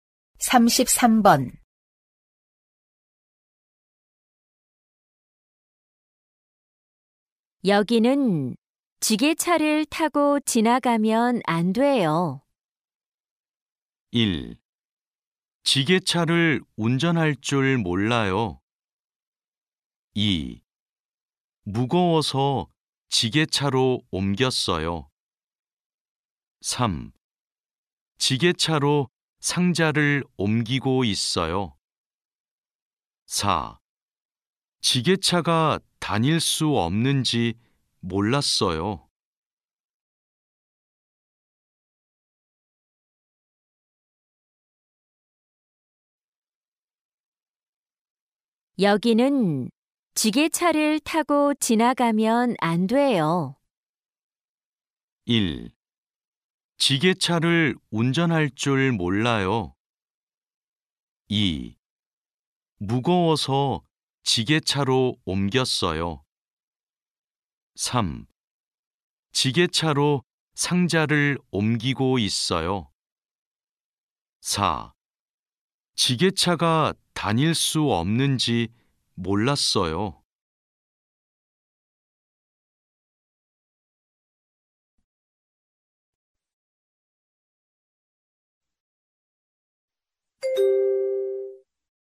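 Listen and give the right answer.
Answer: 4: 지게차가 다닐 수 없는지 몰랐어요.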